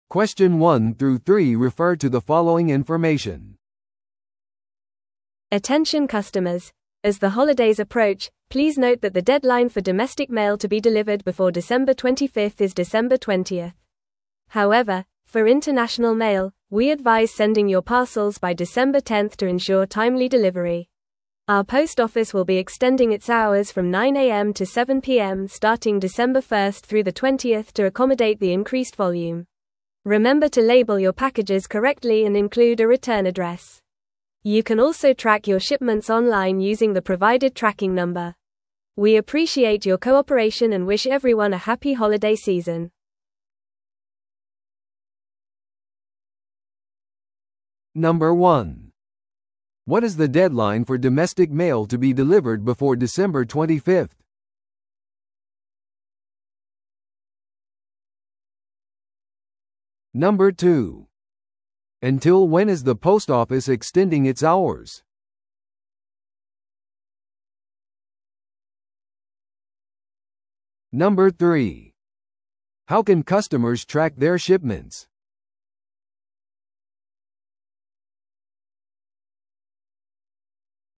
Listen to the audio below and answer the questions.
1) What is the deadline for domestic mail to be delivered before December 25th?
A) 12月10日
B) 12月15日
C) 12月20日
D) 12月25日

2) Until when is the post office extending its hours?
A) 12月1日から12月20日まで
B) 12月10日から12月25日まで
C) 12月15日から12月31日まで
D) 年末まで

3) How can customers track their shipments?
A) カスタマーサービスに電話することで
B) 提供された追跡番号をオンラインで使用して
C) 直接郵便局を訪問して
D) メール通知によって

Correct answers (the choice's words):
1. 12月20日
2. 12月1日から12月20日まで
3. 提供された追跡番号をオンラインで使用して

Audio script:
Attention customers: As the holidays approach, please note that the deadline for domestic mail to be delivered before December 25th is December 20th. However, for international mail, we advise sending your parcels by December 10th to ensure timely delivery. Our post office will be extending its hours from 9am to 7pm starting December 1st through the 20th to accommodate the increased volume. Remember to label your packages correctly and include a return address. You can also track your shipments online using the provided tracking number. We appreciate your cooperation and wish everyone a happy holiday season.